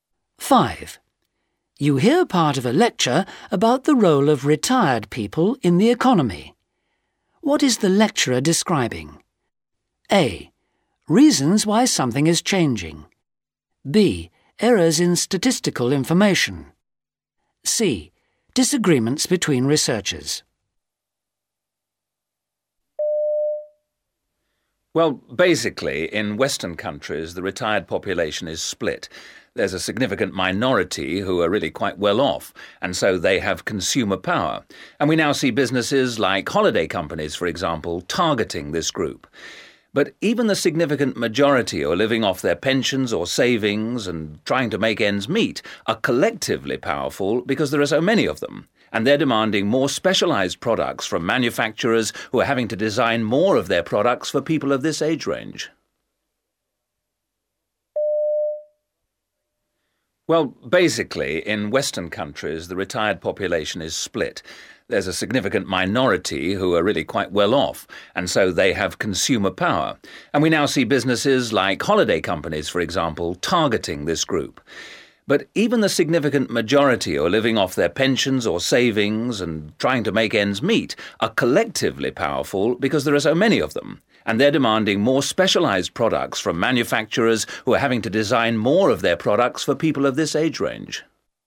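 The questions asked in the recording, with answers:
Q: What is the lecturer describing?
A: A: Reasons why something is changing.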